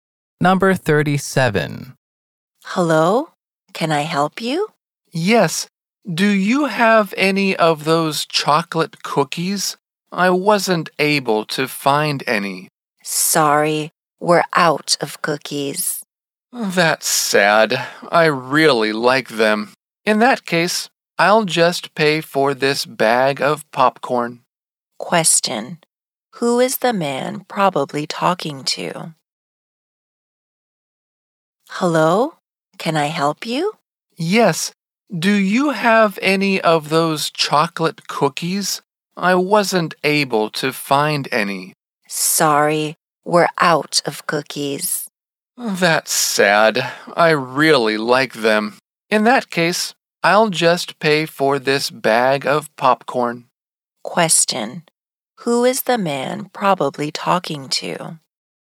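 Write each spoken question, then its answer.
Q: Who is the man probably talking to?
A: A store clerk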